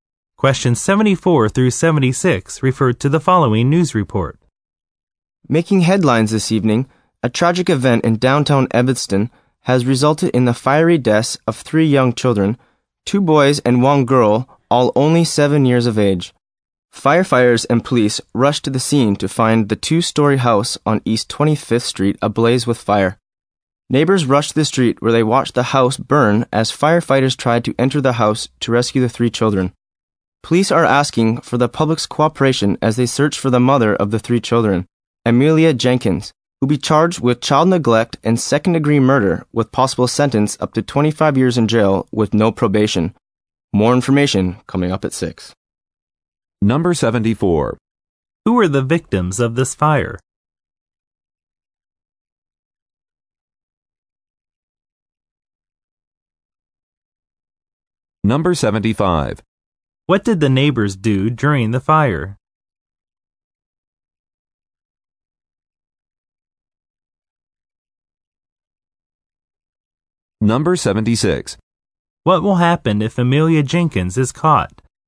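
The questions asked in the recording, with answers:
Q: Who are the victims of this fire?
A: Three 7-year-old children (two boys and a girl)

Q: What did the neighbors do during the fire?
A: They watched the house burn from the street

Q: What will happen if Amelia Jenkins is caught?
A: She will be charged with child neglect and second-degree murder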